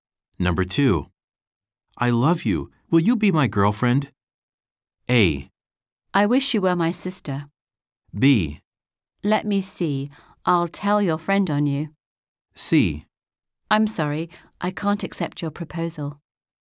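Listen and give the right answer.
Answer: C: I'm sorry. I can't accept your proposal.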